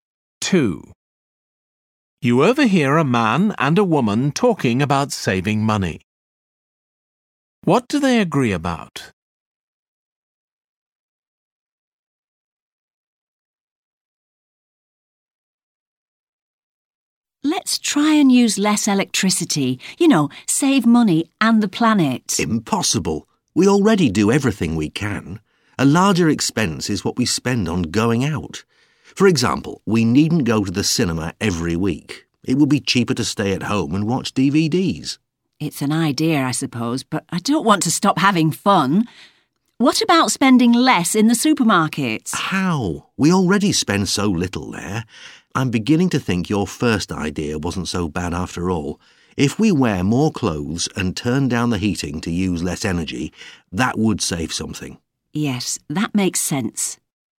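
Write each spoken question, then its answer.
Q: What do they agree about?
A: Using less electricity/energy to save money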